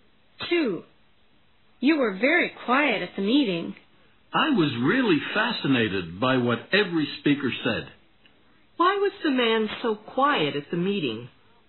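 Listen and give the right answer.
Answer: He was fascinated by what every speaker said.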